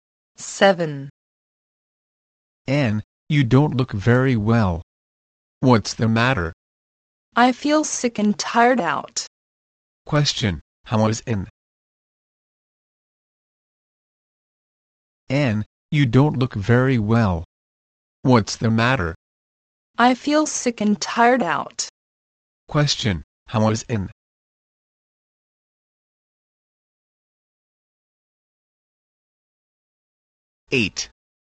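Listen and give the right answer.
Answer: She feels sick and tired out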